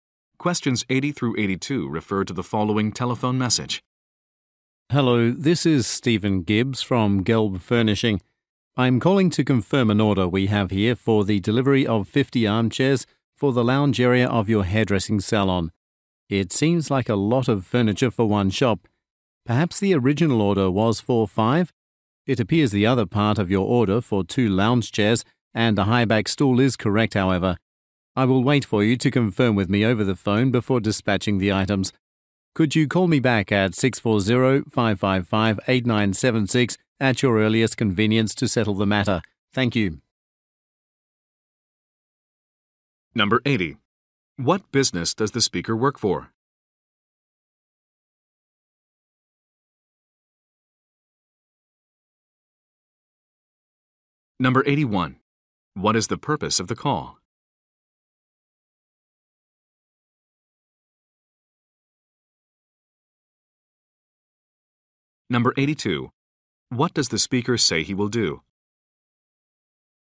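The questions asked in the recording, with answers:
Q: What business does the speaker work for?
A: A furniture company

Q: What is the purpose of the call?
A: To confirm an order

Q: What does the speaker say he will do?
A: Wait for confirmation before dispatching the items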